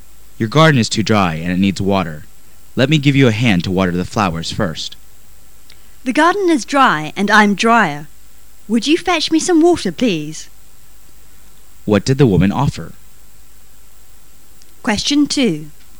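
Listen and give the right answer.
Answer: To help water the flowers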